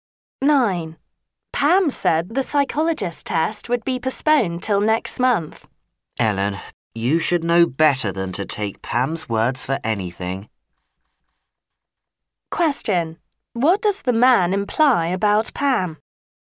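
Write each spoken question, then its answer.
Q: What does the man imply about Pam?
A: Pam's words can't be trusted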